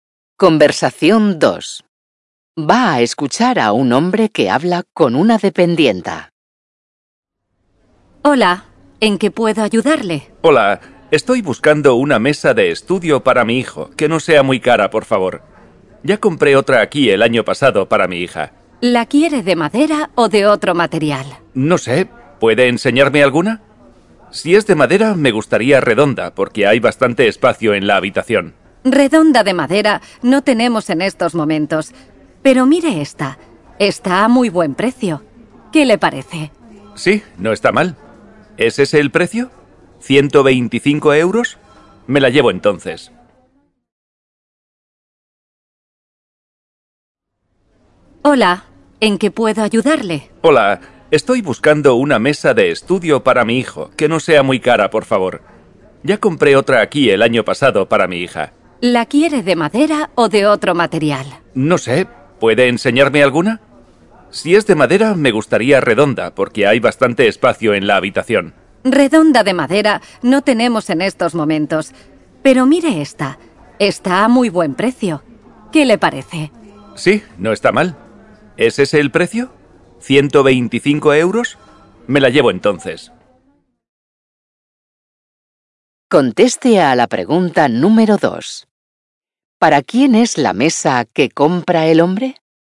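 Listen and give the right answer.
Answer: Para su hijo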